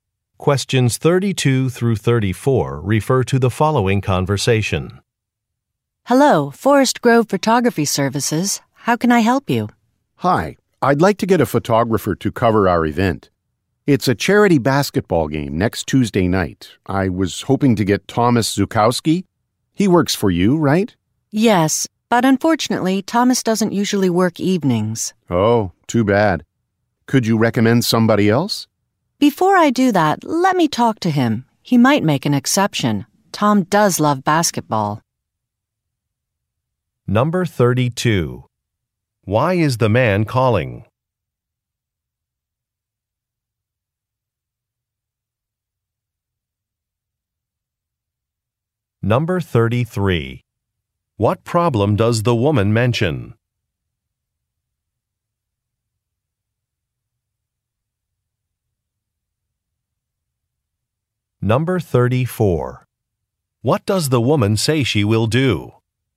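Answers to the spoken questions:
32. To book a photographer for an event (a charity basketball game)
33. Thomas doesn't usually work evenings
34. Talk to Thomas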